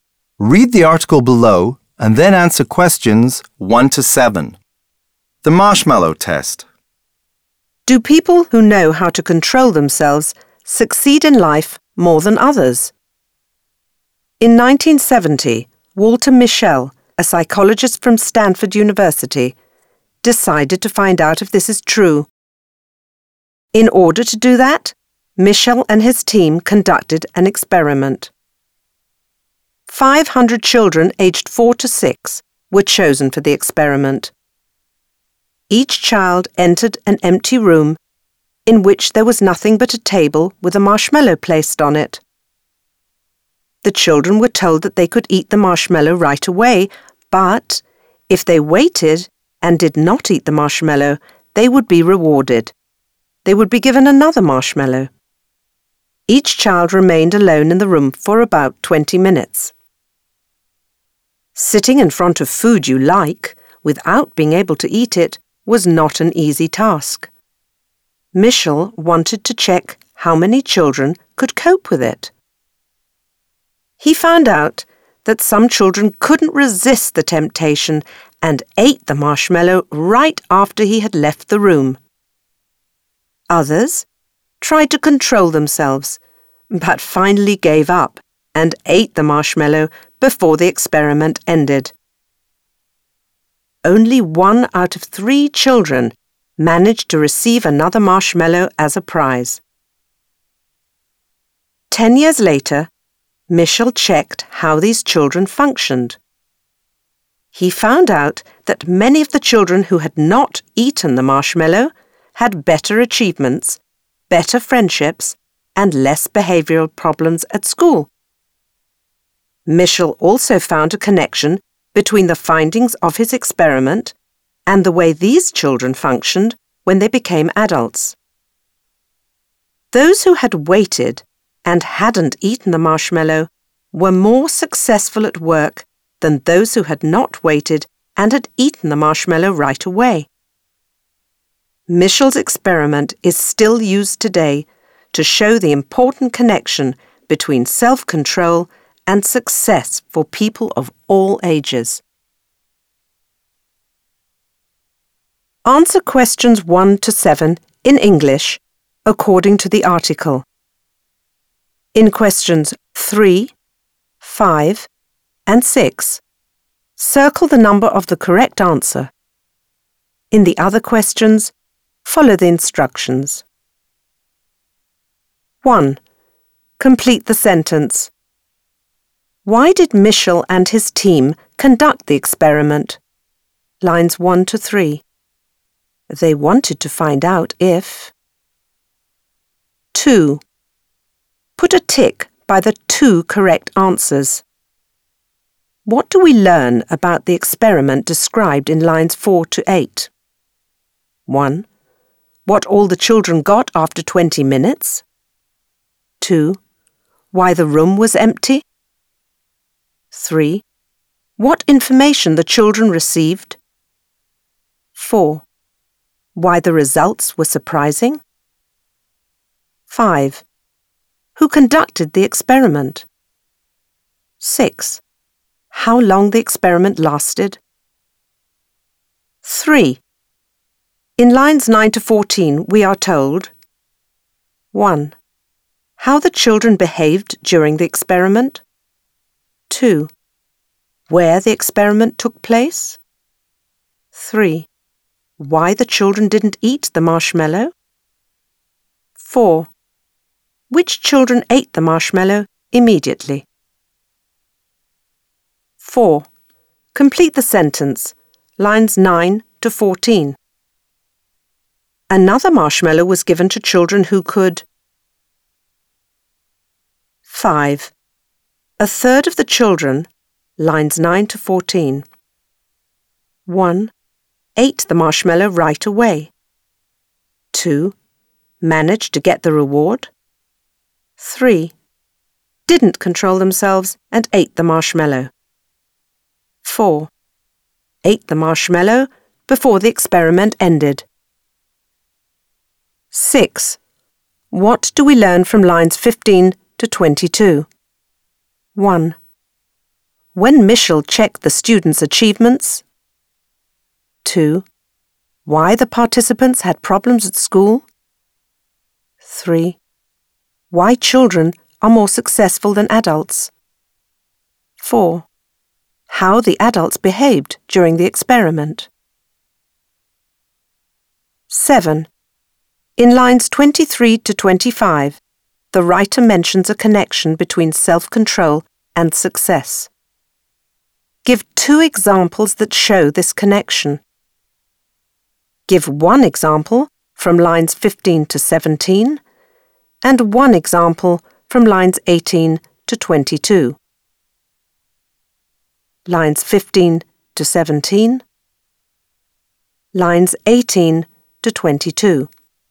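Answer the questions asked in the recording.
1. To find out if people who know how to control themselves succeed in life more than others
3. 1: How the children behaved during the experiment
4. wait and not eat the marshmallow
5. 2: Managed to get the reward
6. 1: When Michel checked the students' achievements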